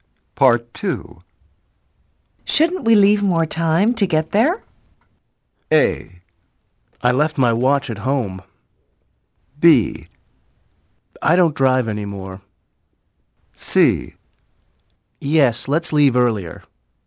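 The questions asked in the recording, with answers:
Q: Shouldn't we leave more time to get there?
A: C: Yes, let's leave earlier.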